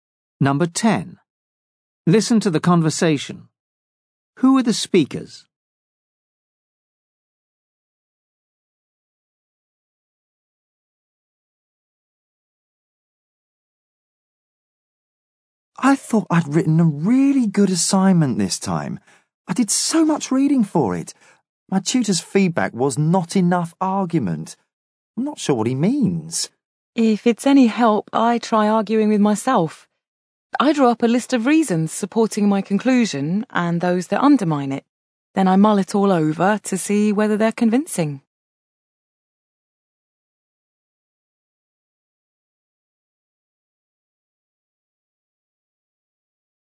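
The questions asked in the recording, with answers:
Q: Who are the speakers?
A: Students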